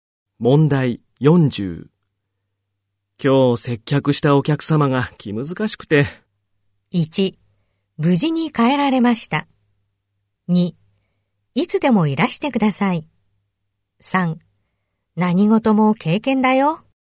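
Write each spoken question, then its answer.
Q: 今日接客したお客様が気難しくて。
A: 3: 何事も経験だよ。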